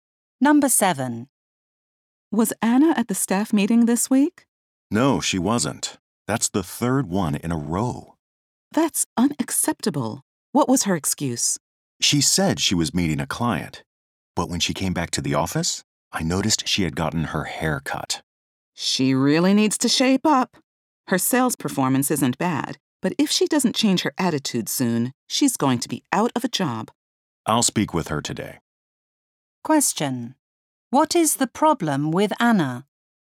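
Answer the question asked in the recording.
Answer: She keeps missing staff meetings and has a bad attitude.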